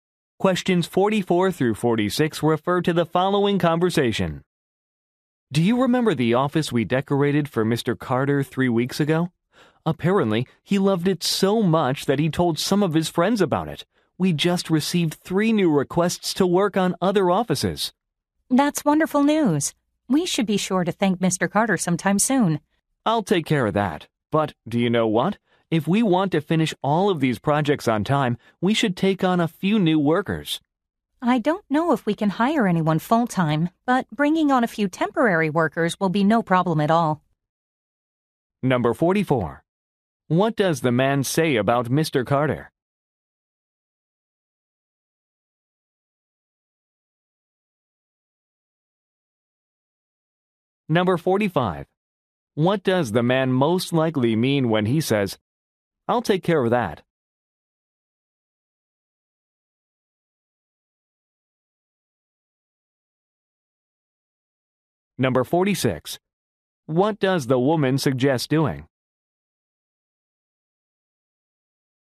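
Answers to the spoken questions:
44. He recommended them to friends
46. Hiring temporary workers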